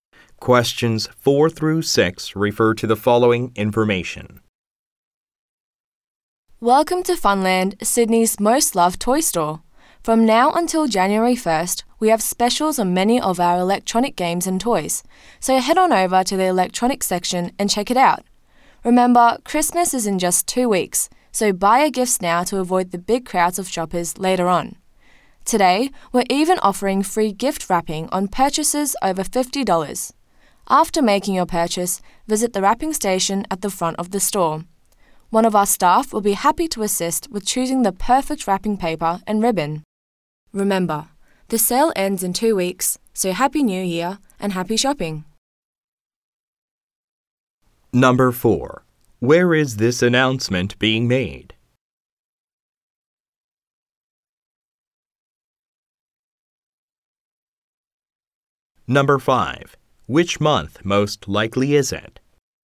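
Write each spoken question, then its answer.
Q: Where is this announcement being made?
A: In a toy store (Funland)

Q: Which month most likely is it?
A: December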